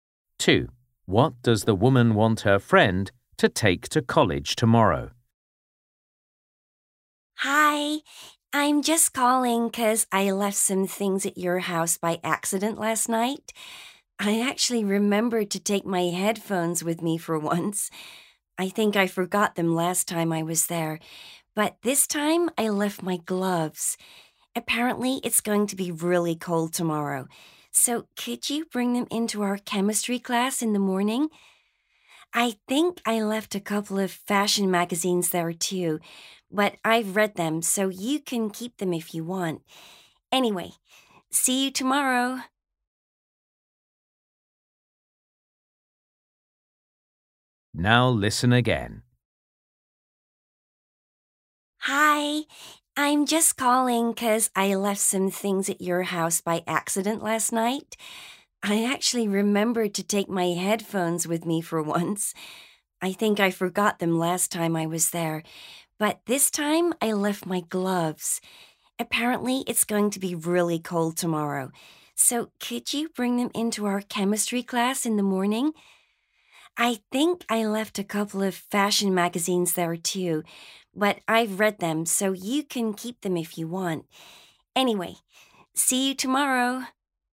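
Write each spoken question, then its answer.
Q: What does the woman want her friend to take to college tomorrow?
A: Her gloves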